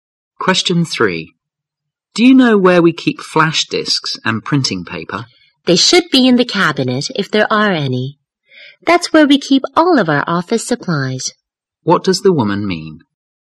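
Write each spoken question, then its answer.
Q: What does the woman mean?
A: Flash disks and printing paper, if there are any, are in the office supply cabinet.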